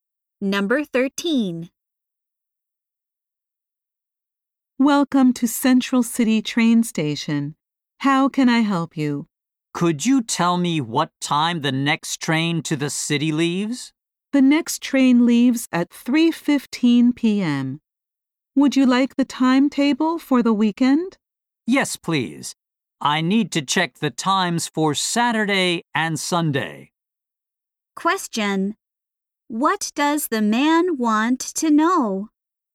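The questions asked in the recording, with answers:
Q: What does the man want to know?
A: What time the next train to the city leaves.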